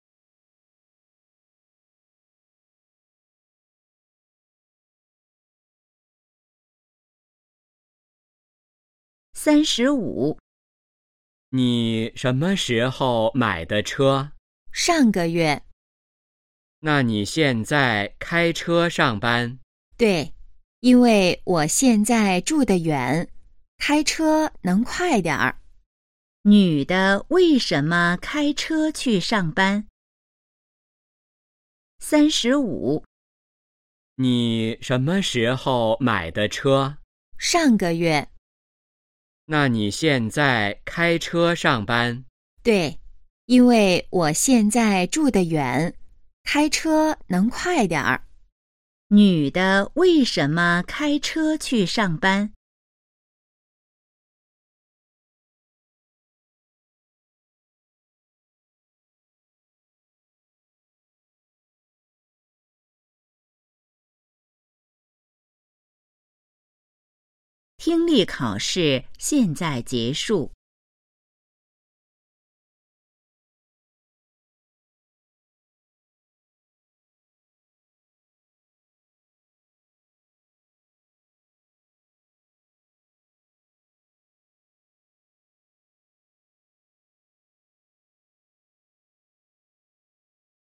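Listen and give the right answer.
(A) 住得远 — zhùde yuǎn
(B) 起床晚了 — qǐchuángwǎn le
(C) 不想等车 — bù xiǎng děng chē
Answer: (A) 住得远 — zhùde yuǎn

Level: HSK2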